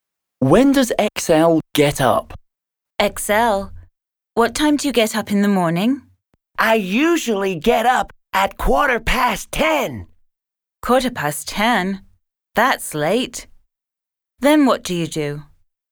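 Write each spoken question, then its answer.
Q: When does XL get up?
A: At 10:15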